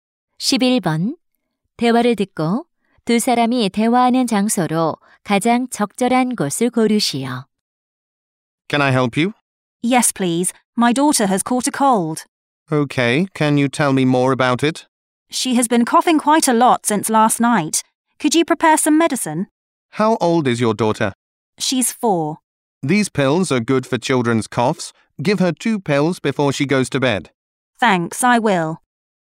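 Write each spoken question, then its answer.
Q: 대화를 듣고 두 사람이 대화하는 장소로 가장 적절한 곳을 고르시오.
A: 약국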